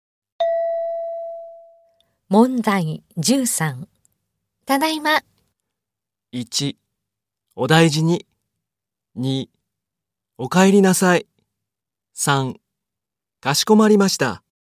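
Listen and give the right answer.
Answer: 2: お帰りなさい。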